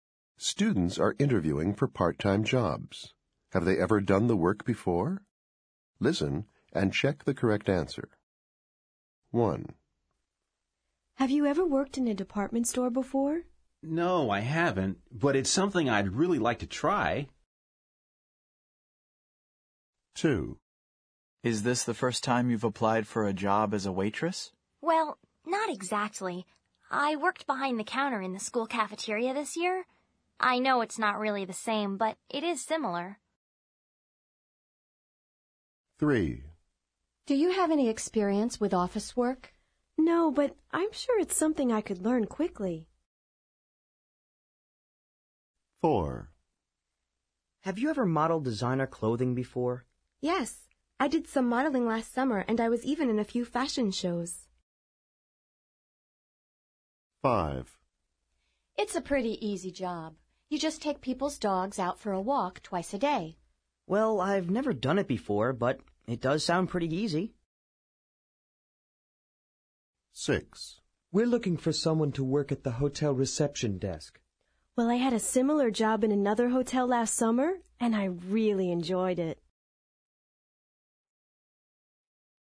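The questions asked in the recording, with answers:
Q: Have they ever done the work before?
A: No

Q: Have they ever done the work before?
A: No

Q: Have they ever done the work before?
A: Yes

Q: Have they ever done the work before?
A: No

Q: Have they ever done the work before?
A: Yes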